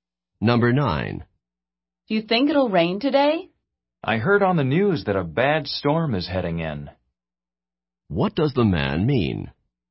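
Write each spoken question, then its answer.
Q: What does the man mean?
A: It will probably rain, because a bad storm is coming.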